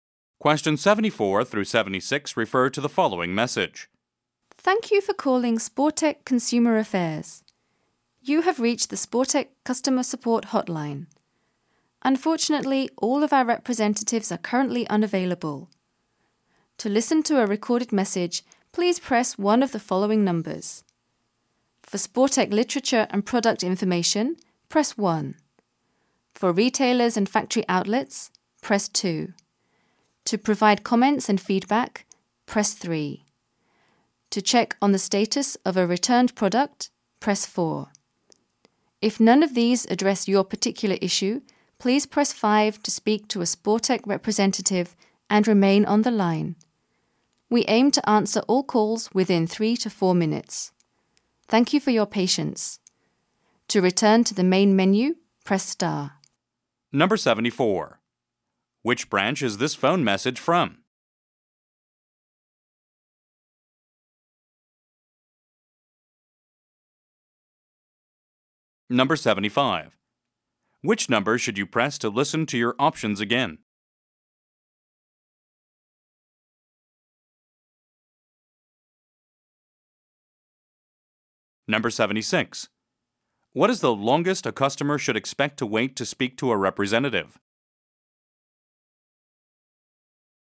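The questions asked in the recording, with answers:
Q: Which branch is this phone message from?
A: Sportech Consumer Affairs (Customer Support Hotline)

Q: Which number should you press to listen to your options again?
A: Star

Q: What is the longest a customer should expect to wait to speak to a representative?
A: 4 minutes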